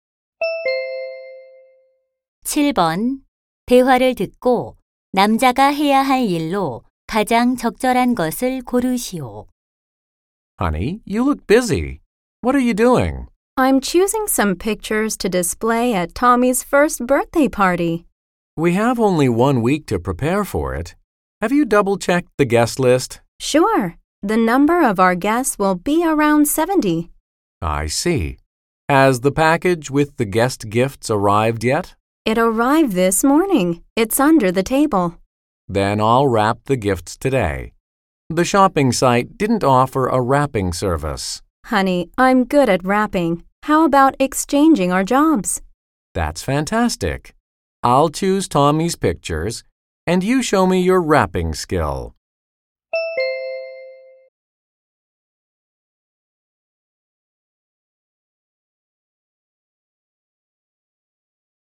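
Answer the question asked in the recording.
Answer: 선물 포장하기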